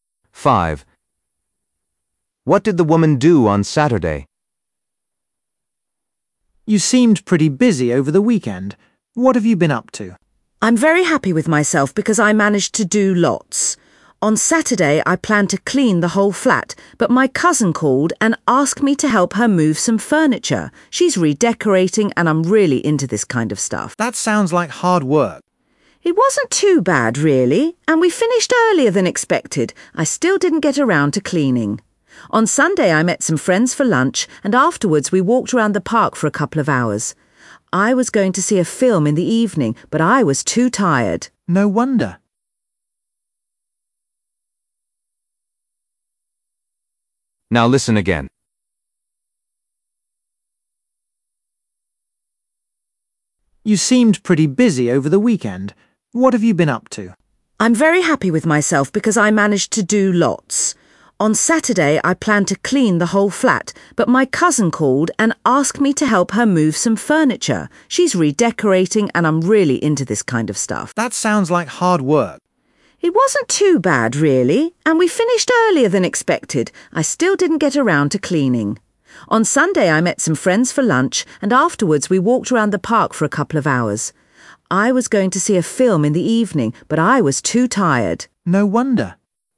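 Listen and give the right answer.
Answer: helped her cousin move furniture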